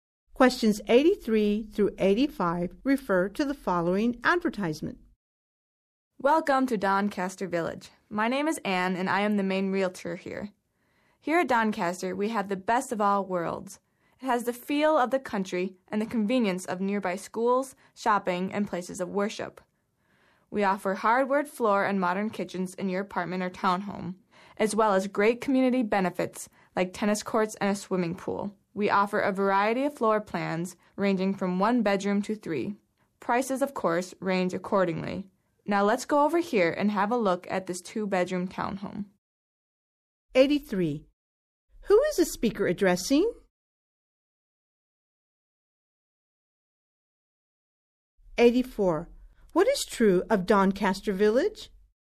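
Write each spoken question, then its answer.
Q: Who is the speaker addressing?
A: Prospective home buyers or renters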